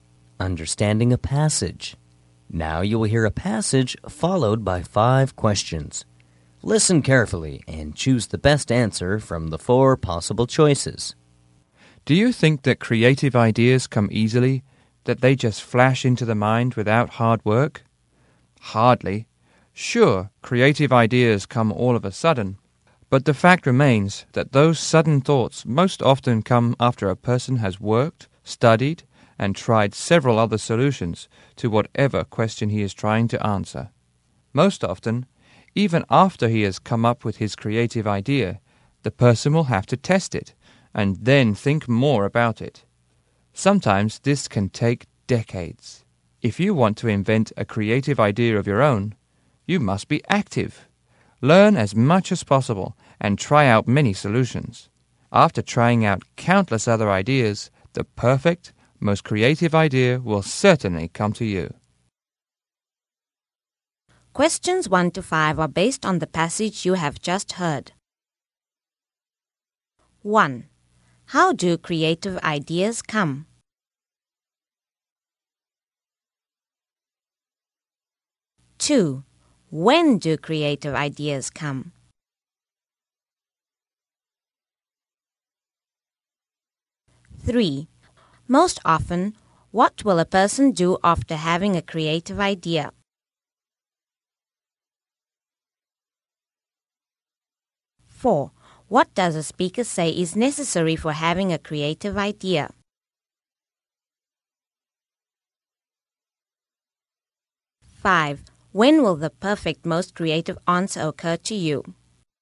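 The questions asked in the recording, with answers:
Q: When do creative ideas come?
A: After a person has worked, studied and tried other solutions

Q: Most often, what will a person do after having a creative idea?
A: Test it and think more about it

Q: What does a speaker say is necessary for having a creative idea?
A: Being active: learning as much as possible and trying many solutions

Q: When will the perfect, most creative answer occur to you?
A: After trying out countless other ideas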